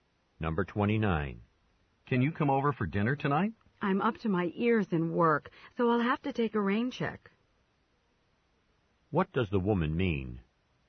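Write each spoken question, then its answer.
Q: What does the woman mean?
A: She is too busy to come tonight but would like to another time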